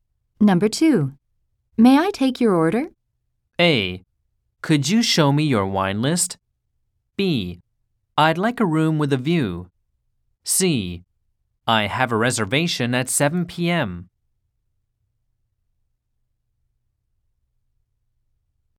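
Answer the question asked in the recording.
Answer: A: Could you show me your wine list?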